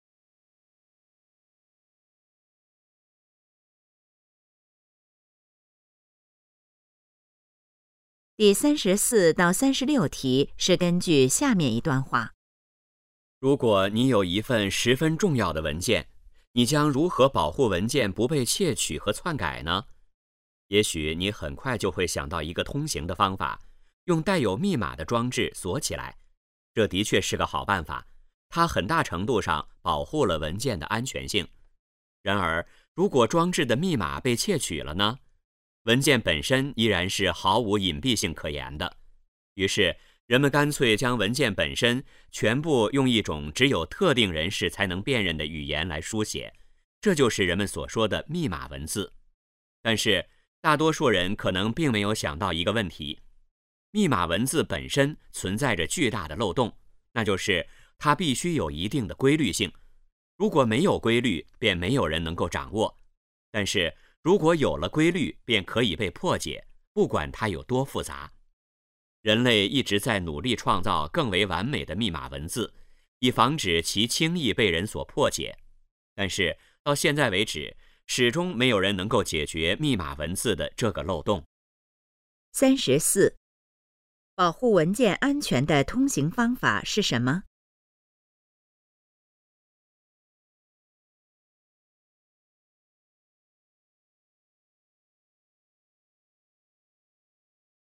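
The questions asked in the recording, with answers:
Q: 保护文件安全的通行方法是什么?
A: 用带有密码的装置锁起来

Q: 密码文字的漏洞是什么?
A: 必须有一定的规律性,因而可被破解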